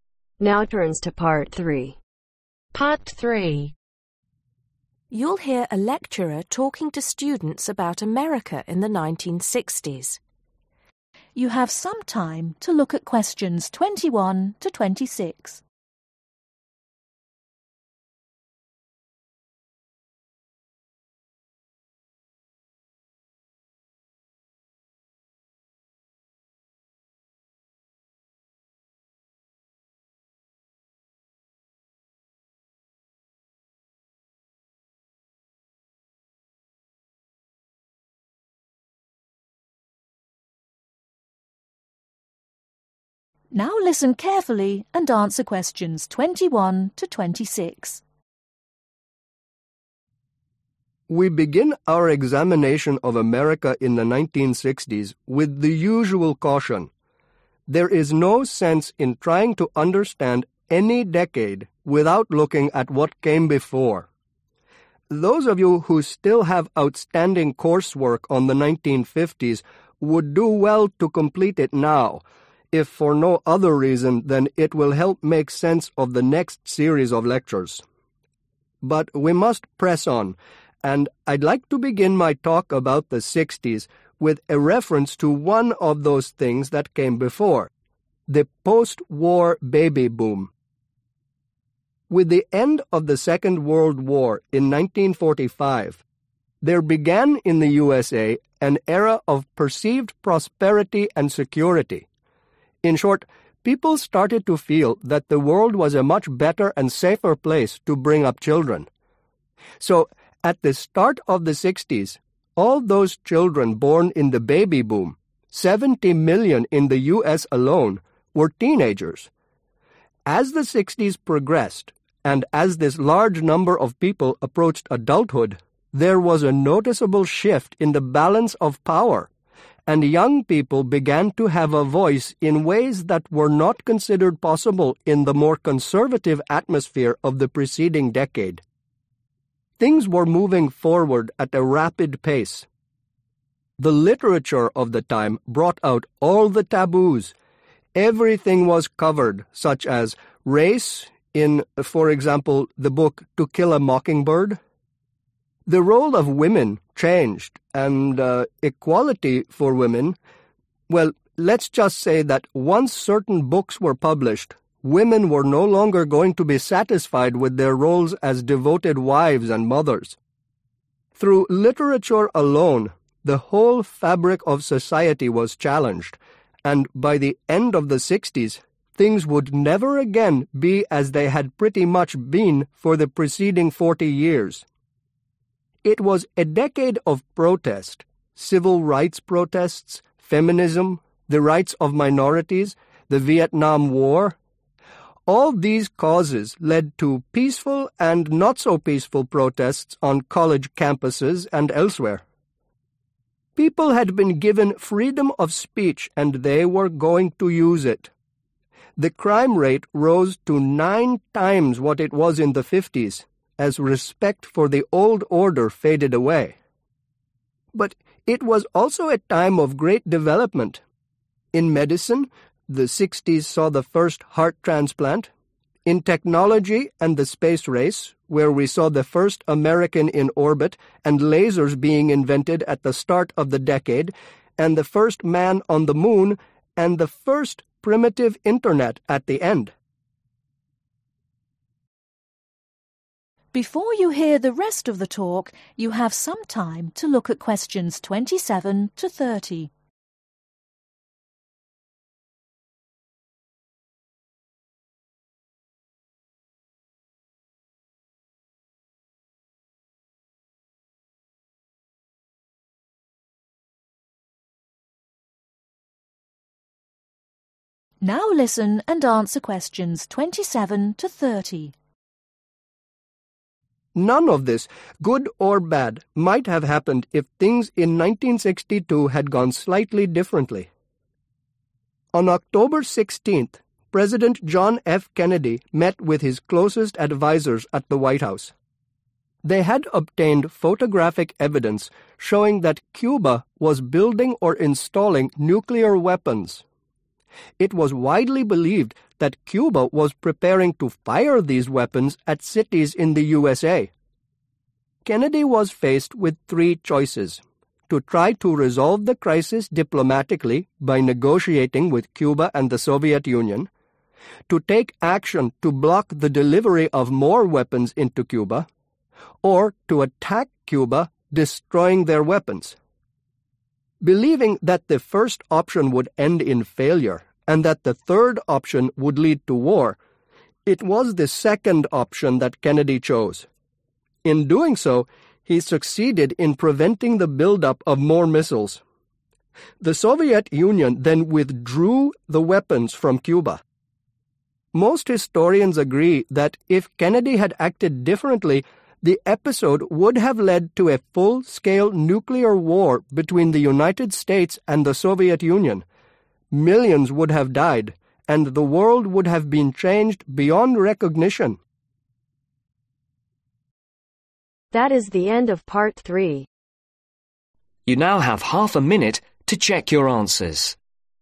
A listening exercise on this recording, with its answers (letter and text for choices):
Choose the correct letter A , B or C.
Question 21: According to the lecturer, the 'baby boom' happened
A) because of relaxed attitudes in the sixties.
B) during a time of war.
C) because people felt more secure.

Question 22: In the sixties, the USA had 70 million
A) teenagers.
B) babies.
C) adults.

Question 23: According to the lecturer, compared to the 1950s, the 1960s were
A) less conservative.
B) more conservative.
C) just as conservative.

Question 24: According to the lecturer, literature changed the way women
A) over 40 were treated by society.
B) viewed issues of race in society.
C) felt about their roles in society.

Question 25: The rate crime in the sixties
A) rose nine percent during the decade.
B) was nine times higher than in the fifties.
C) was nine times lower than in the fifties.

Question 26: What happened at the start of the 1960s ?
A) the first heart transplant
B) the introduction of the internet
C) the invention of lasers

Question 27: In October, 1962, US President Kennedy met advisers to discuss photographic (27)............ which proved that the Cubans were installing nuclear missiles, presumably to use against the US.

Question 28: Kennedy was faced with three choices: to try to resolve the crisis (28)............ ; to block the delivery of further weapons into Cuba; or to attack Cuba.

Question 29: Kennedy chose the (29)........... option, which prevented the build-up of more missiles and led to the withdrawal of the existing ones.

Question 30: Most are agreed that a (30)............ war was narrowly avoided by Kennedy's decision.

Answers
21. C) because people felt more secure.
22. A) teenagers.
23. A) less conservative.
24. C) felt about their roles in society.
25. B) was nine times higher than in the fifties.
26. C) the invention of lasers
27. Evidence
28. Diplomatically
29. Second
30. Nuclear